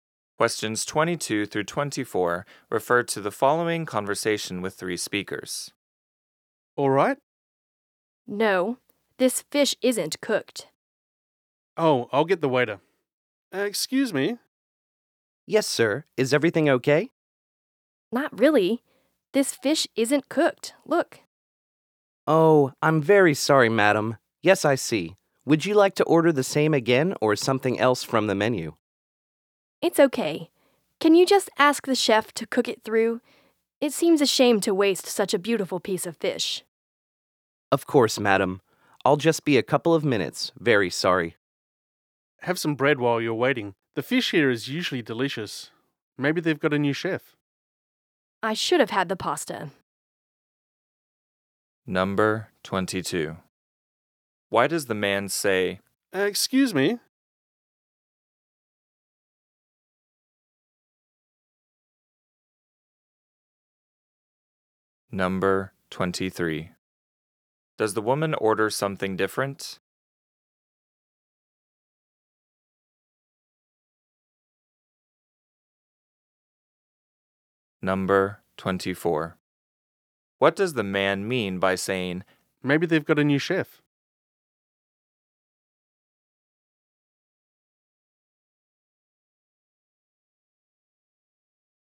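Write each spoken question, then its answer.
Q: Why does the man say, Excuse me?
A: To get the waiter's attention

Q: Does the woman order something different?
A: No, she asks the chef to cook the same fish through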